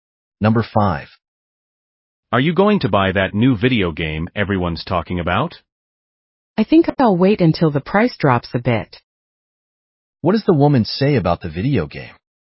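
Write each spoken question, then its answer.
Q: What does the woman say about the video game?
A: She will wait until the price drops before buying it.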